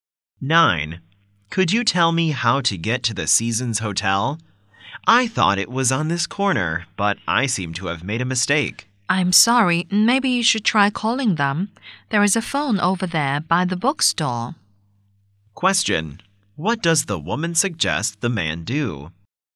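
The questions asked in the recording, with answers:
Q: What does the woman suggest the man do?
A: Call the hotel.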